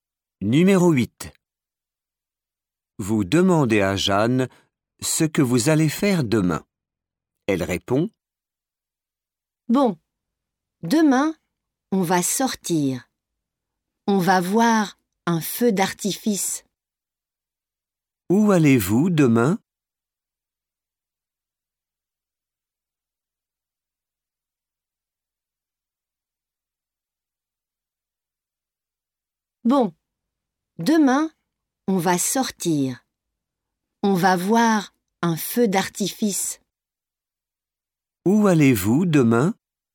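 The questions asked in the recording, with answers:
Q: Où allez-vous demain ?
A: voir un feu d'artifice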